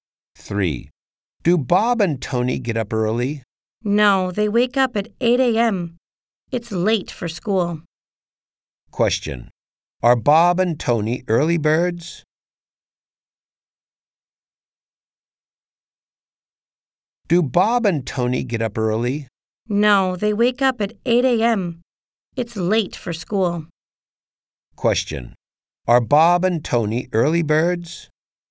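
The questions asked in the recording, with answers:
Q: Are Bob and Tony early birds?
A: No, they aren't.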